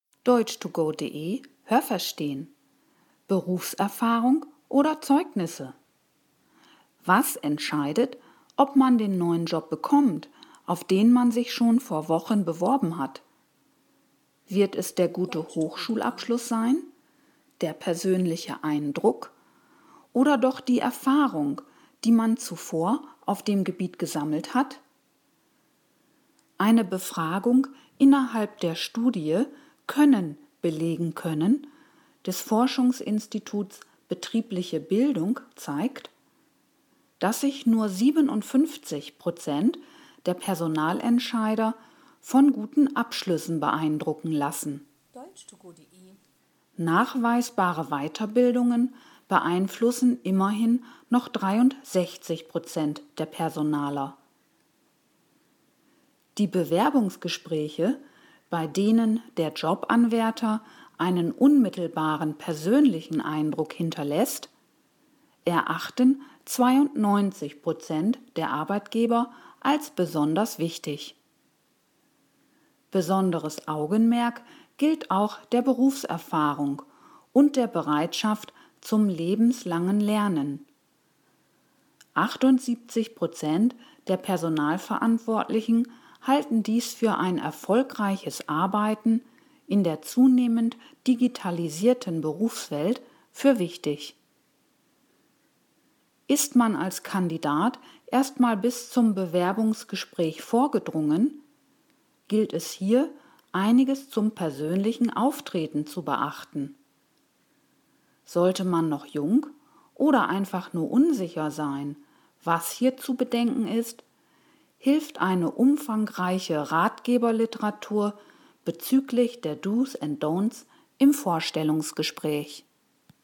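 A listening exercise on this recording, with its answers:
Haben Sie das gehört? Stimmt diese Aussage?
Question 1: Für die meisten Personalentscheider ist ein guter Abschluss des Bewerbers wichtig.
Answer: Nein, das habe ich nicht gehört.

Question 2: Nachweisbare Weiterbildungen beeinflussen 78 % der Personalverantwortlichen.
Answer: Nein, das habe ich nicht gehört.

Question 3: Die überragende Mehrheit der Personaler misst dem Bewerbungsgespräch großen Wert bei.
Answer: Ja, das habe ich gehört.

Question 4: Im Bewerbungsgespräch ist die Art, wie man persönlich in Erscheinung tritt, von Bedeutung.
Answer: Ja, das habe ich gehört.

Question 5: Im Vorstellungsgespräch gibt es Literatur zu den „Dos and Don'ts" bei Bewerbungen.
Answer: Nein, das habe ich nicht gehört.

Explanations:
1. Laut Text ist dies nur für 57 % der Personaler wichtig.
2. Es sind 63 %. Die 78 % beziehen sich auf Berufserfahrung und die Bereitschaft zu lebenslangem Lernen.
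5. Es gibt Ratgeberliteratur zum Vorstellungsgespräch, d.h. dazu, wie man sich verhalten sollte („Dos") und was man unterlassen sollte („Don'ts").

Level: B2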